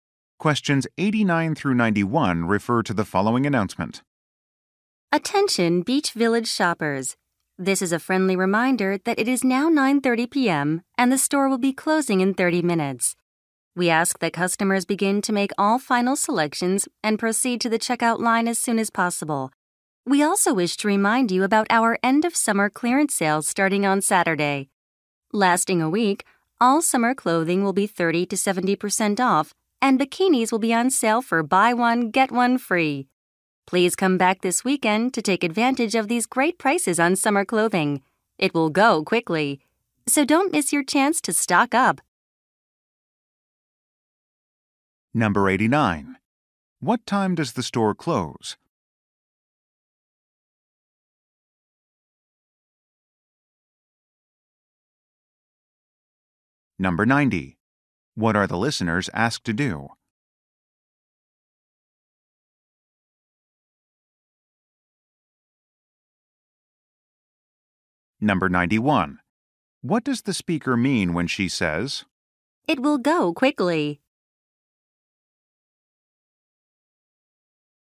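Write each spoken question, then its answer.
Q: What time does the store close?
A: 10:00 p.m.

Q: What are the listeners asked to do?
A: Make final selections and go to the checkout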